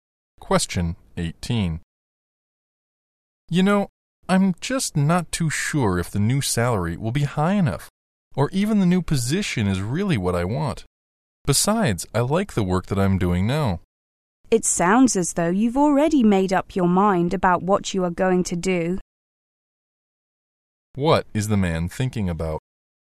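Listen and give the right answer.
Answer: Whether to take a new job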